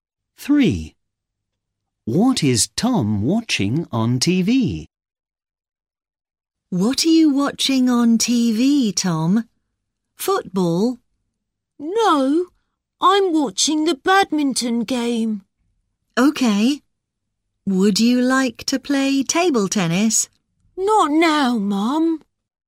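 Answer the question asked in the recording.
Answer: the badminton game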